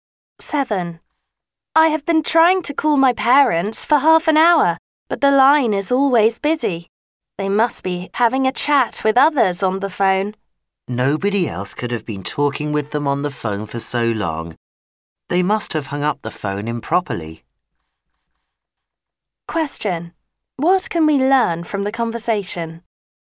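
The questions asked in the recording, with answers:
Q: What can we learn from the conversation?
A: The parents' phone may not have been hung up properly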